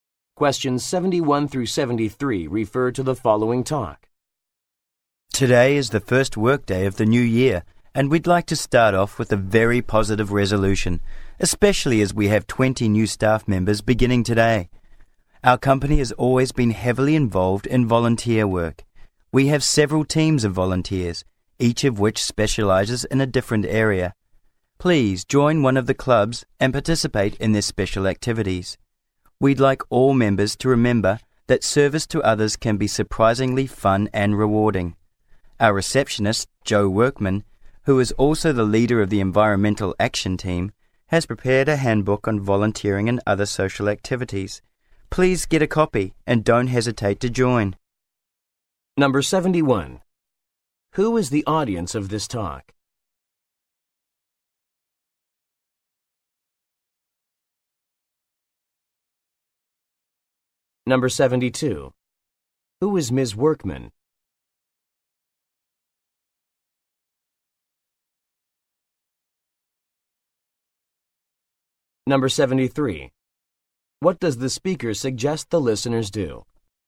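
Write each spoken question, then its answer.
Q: Who is the audience of this talk?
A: Company staff, including new employees

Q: Who is Ms. Workman?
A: The receptionist and leader of the Environmental Action Team

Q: What does the speaker suggest the listeners do?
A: Join a volunteer club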